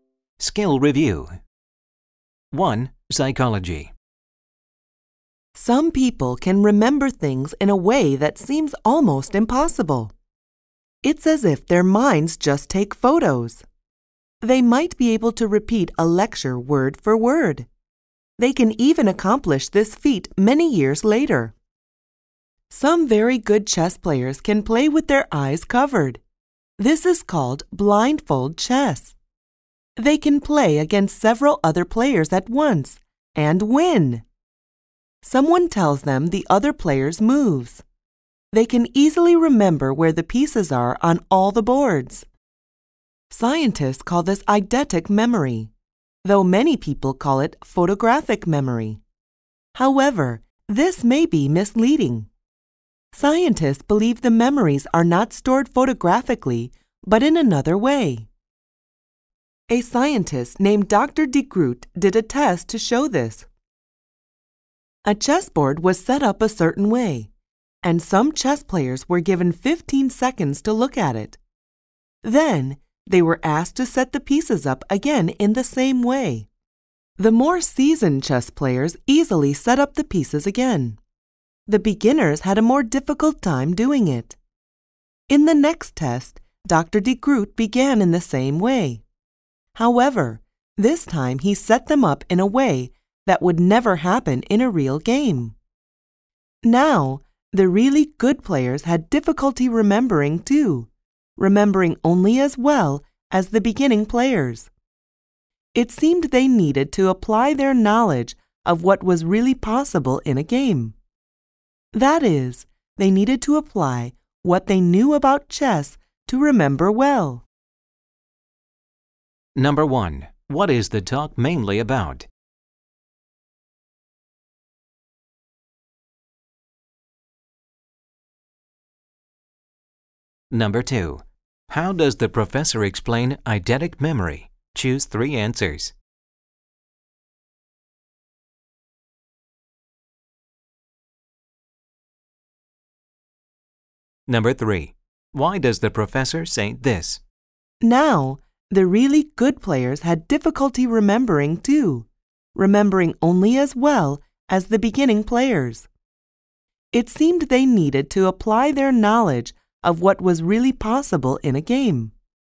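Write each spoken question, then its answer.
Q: What is the talk mainly about?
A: Eidetic (photographic) memory and how it works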